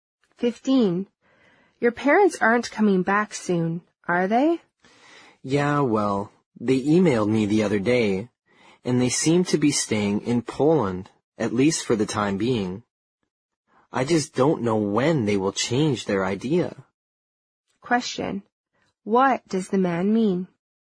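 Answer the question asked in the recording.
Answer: His parents are staying in Poland for now and he doesn't know when they'll come back.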